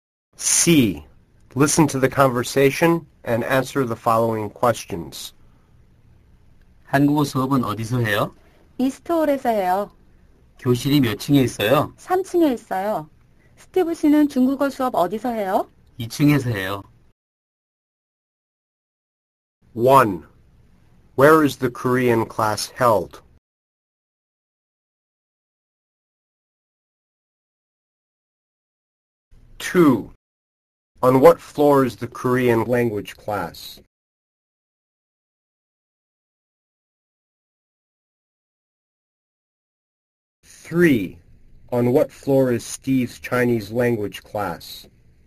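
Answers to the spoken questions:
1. In East Hall
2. The 3rd floor
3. The 2nd floor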